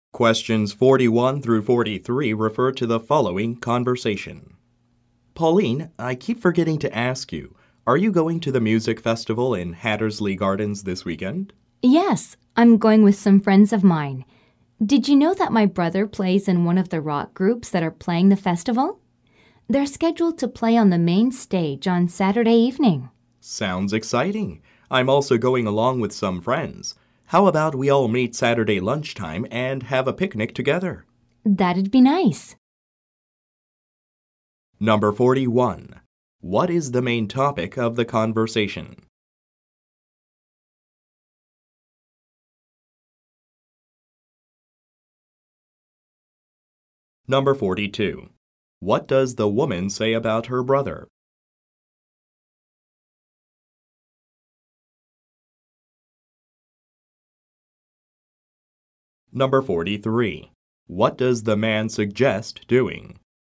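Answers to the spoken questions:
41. A music festival in Hattersley Gardens this weekend
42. He plays in a rock group at the festival
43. Meeting Saturday lunchtime for a picnic together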